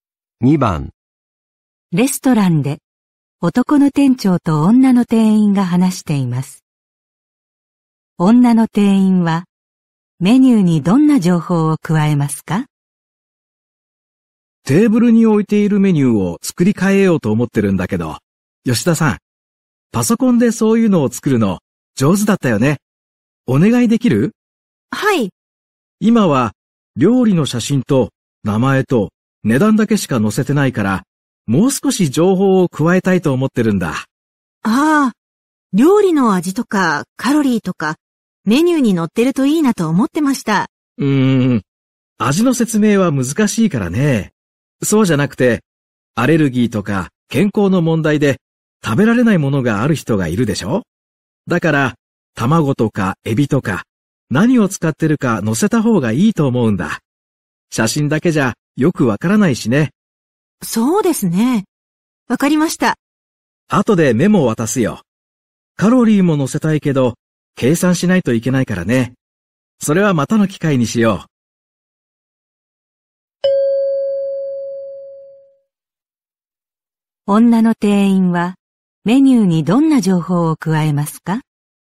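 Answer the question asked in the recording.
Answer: 料理に使っている材料(卵やエビなど)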